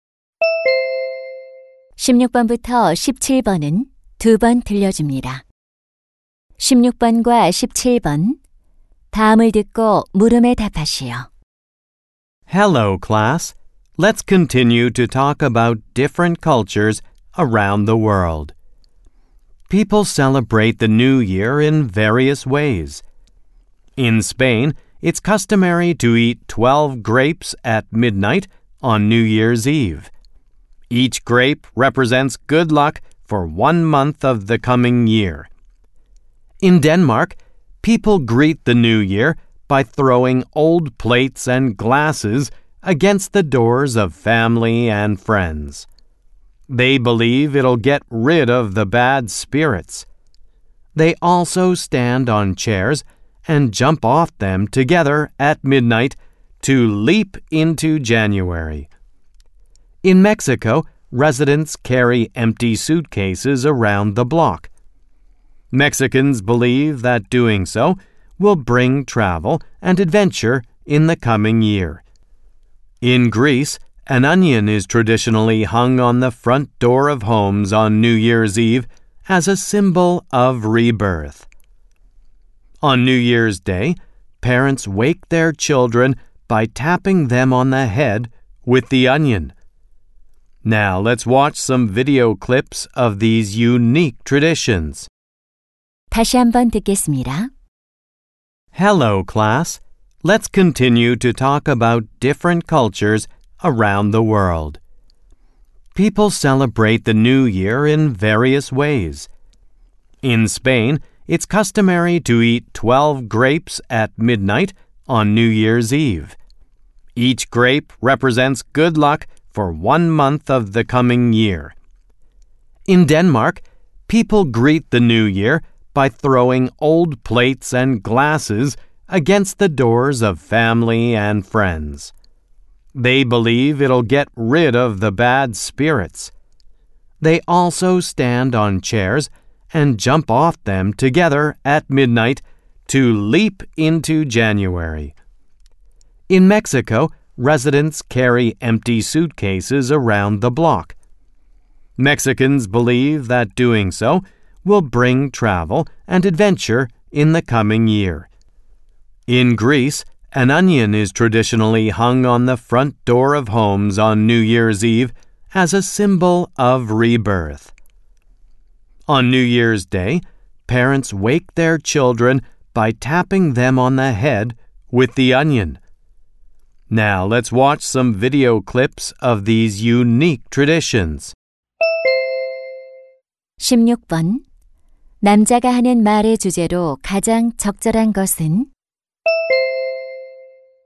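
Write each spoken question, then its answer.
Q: 남자가 하는 말의 주제로 가장 적절한 것은?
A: 여러 나라의 독특한 새해 전통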